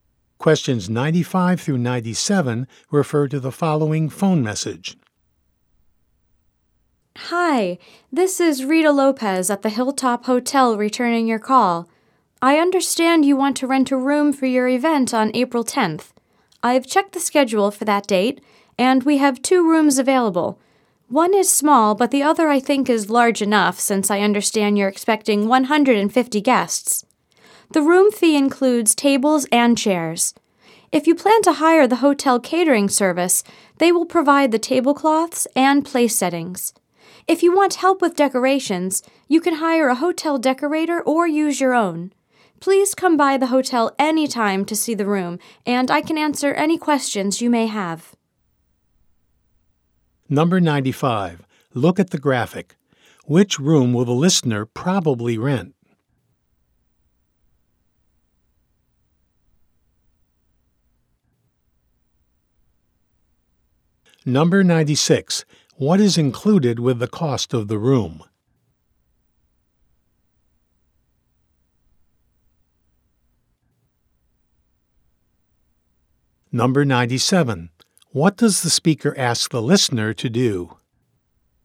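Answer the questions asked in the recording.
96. Tables and chairs
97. Come by the hotel to see the room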